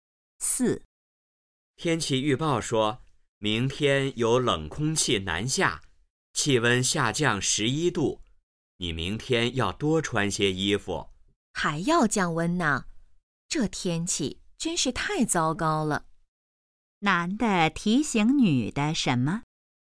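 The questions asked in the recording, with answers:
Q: 男的提醒女的什么?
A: 明天多穿些衣服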